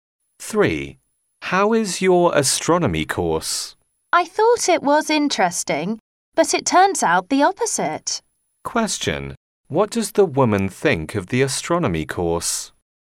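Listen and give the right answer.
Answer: It is not interesting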